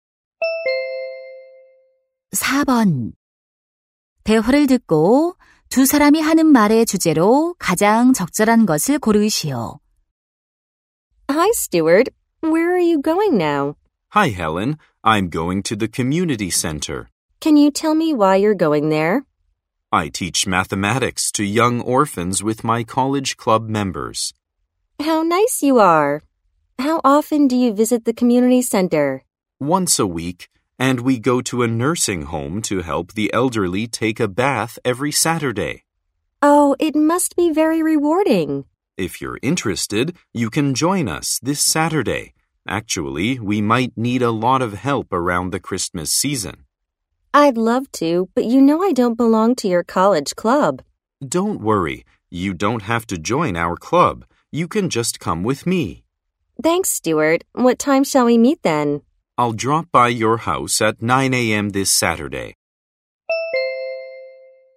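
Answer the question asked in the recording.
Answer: 봉사 활동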